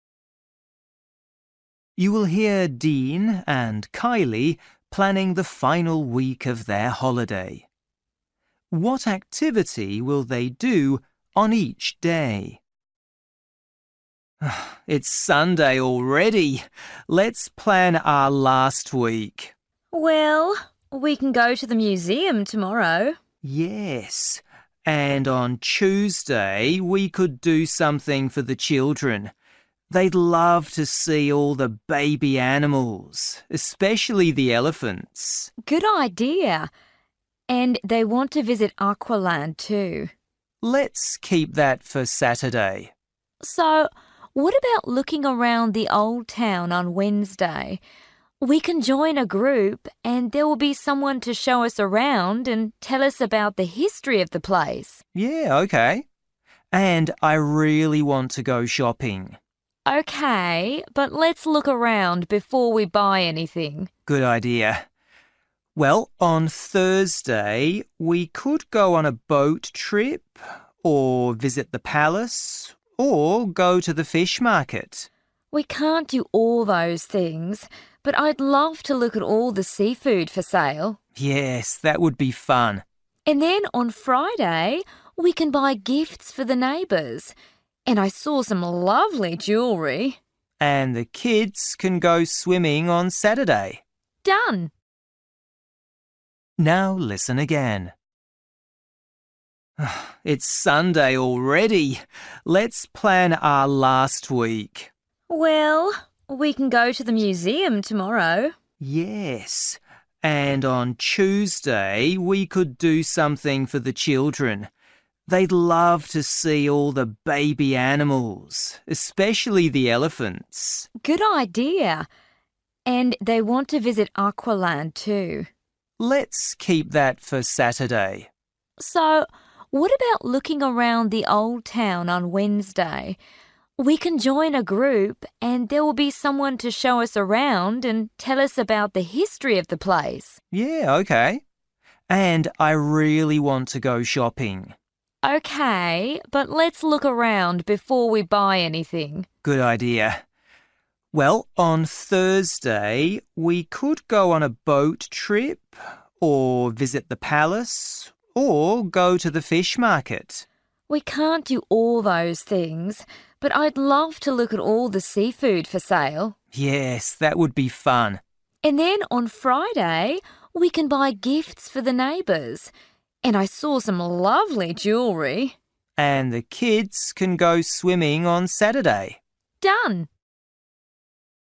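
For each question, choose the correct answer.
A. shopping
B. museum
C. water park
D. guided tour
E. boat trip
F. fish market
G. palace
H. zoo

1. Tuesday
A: H

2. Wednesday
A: D

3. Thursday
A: F

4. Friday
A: A

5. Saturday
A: C

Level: Luyện nghe trình độ A2

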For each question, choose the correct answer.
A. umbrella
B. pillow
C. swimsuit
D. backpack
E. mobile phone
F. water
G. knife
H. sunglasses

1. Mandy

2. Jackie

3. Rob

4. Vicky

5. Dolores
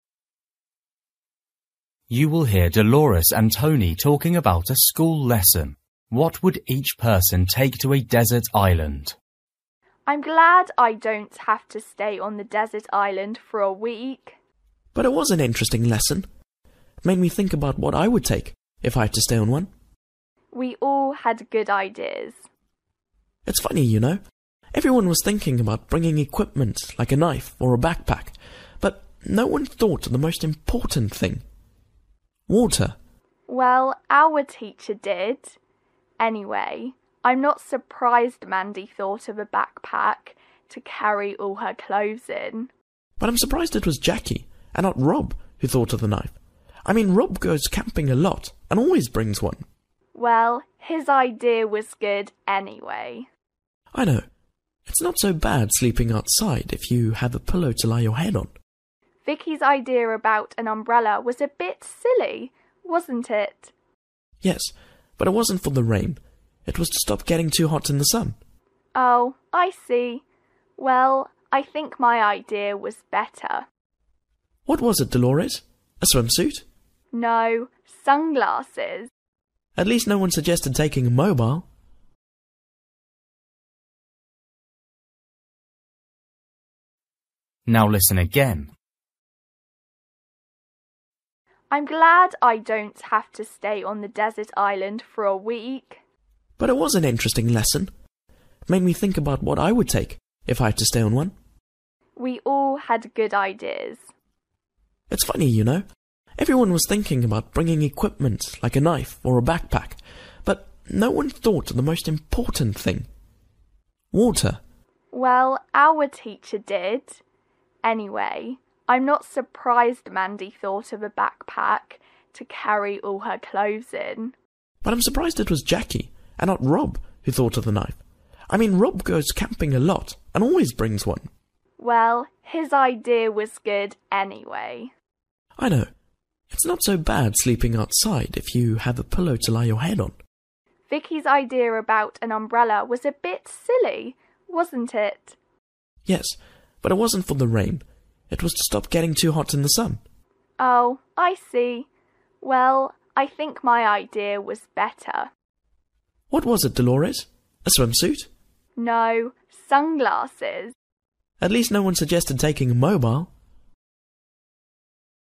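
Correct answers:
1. D
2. G
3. B
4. A
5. H

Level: Luyện nghe trình độ A2

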